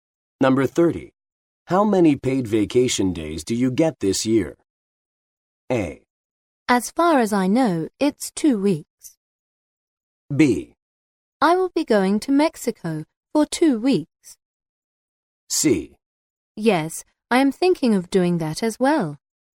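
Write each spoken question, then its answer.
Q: How many paid vacation days do you get this year?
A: A: As far as I know, it's 2 weeks.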